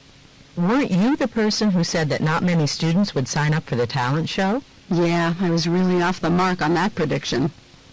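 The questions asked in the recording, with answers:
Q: What can be inferred from the conversation?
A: Many students signed up for the talent show, contrary to the speaker's prediction.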